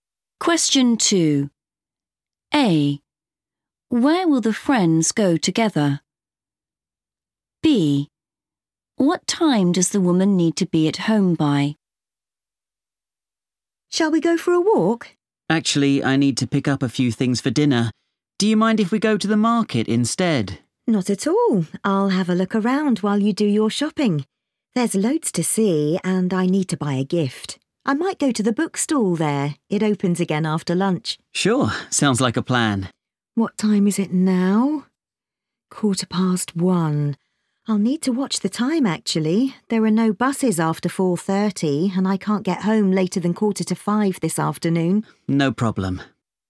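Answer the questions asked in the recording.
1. the market
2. 4:45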